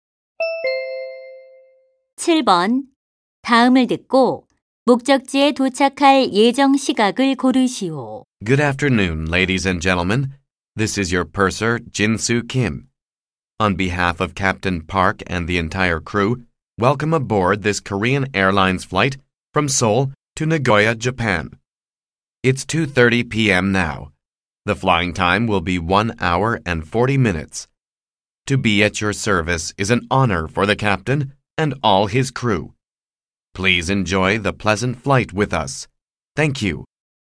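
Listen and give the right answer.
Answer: 오후 4시 10분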